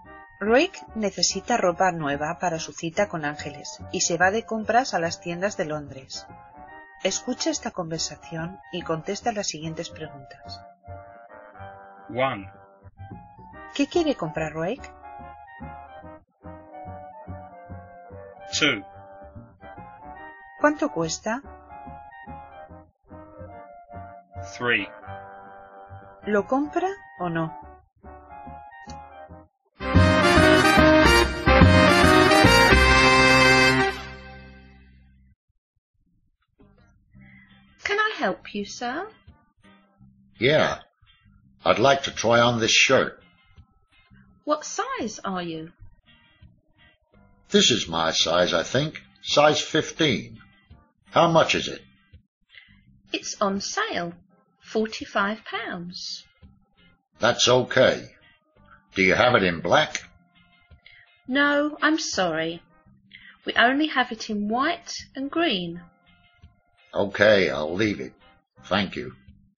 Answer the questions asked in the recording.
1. A shirt.
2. £45.
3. I'll leave it.